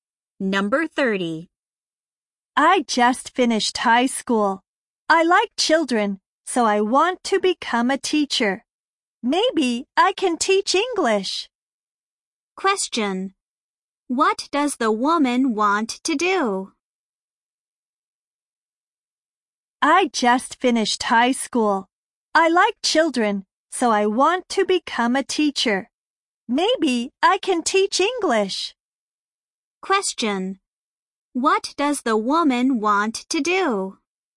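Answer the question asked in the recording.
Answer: Become a teacher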